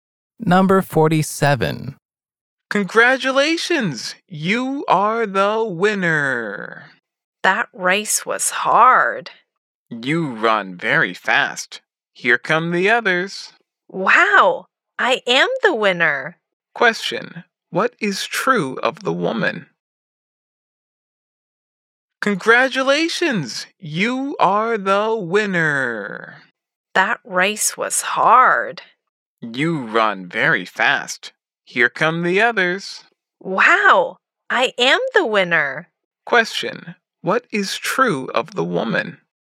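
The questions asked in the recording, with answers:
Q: What is true of the woman?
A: She won the race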